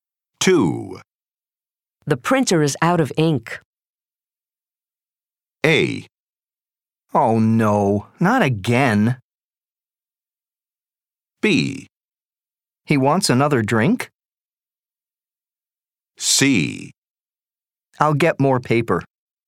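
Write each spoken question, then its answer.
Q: The printer is out of ink.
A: A: Oh no, not again.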